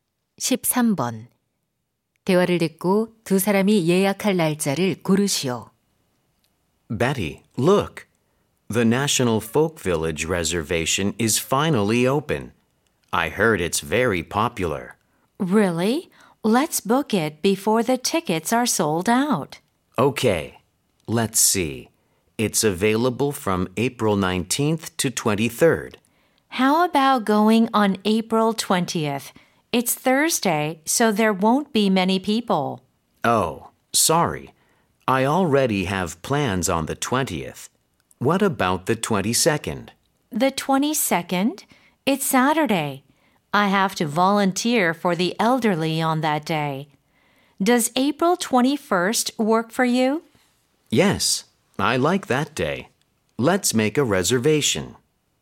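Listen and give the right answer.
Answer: 4월 21일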